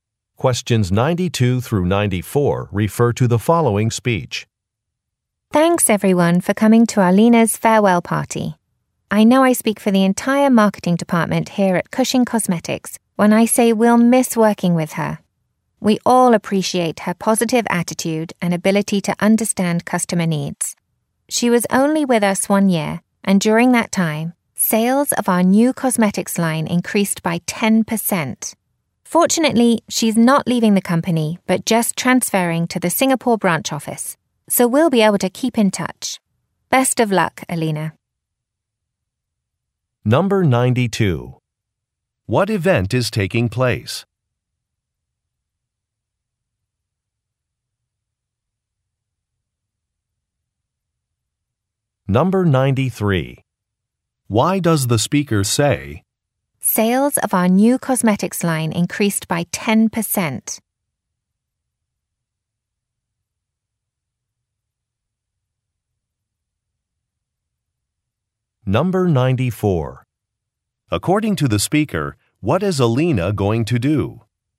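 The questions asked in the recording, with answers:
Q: What event is taking place?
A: A farewell party

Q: According to the speaker, what is Alina going to do?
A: Transfer to the Singapore branch office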